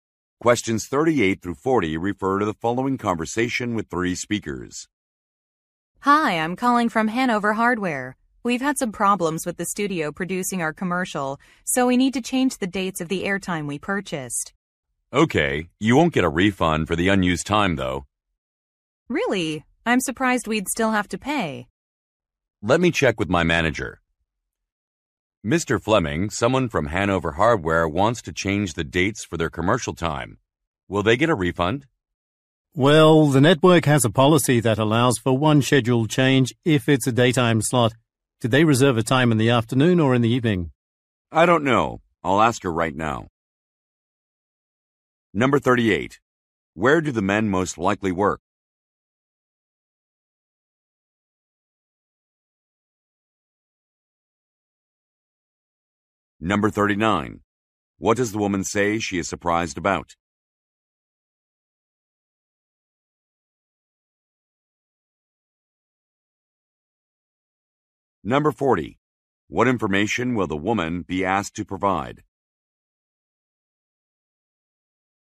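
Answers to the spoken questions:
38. At a broadcasting network
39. That they would not get a refund
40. Whether the reserved time is in the afternoon or evening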